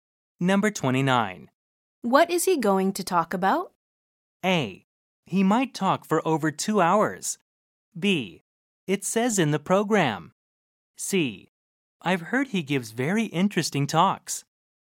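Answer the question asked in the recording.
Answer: B: It says in the program.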